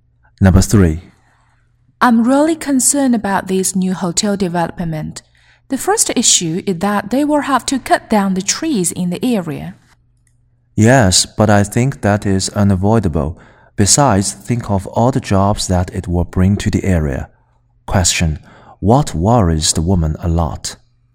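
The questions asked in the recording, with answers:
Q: What worries the woman a lot?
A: Trees will be cut down for the new hotel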